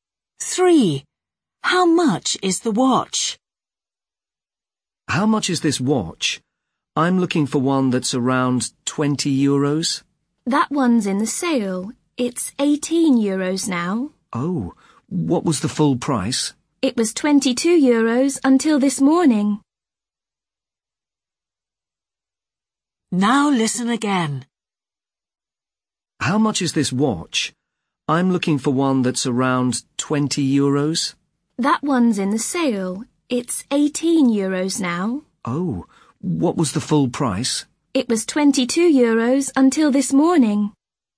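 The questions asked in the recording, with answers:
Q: How much is the watch?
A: 18 euros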